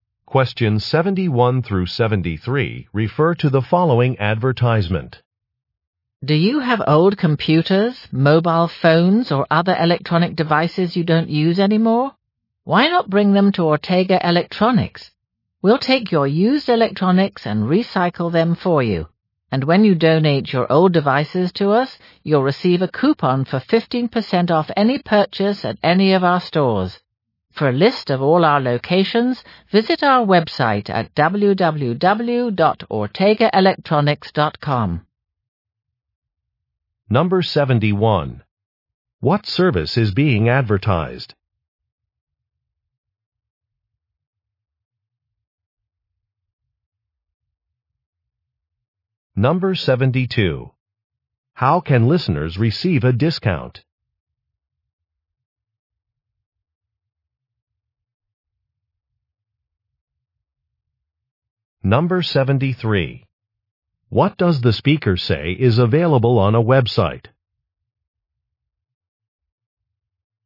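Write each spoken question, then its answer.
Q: What service is being advertised?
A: Recycling of used electronics

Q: How can listeners receive a discount?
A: By donating old devices

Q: What does the speaker say is available on a website?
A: A list of store locations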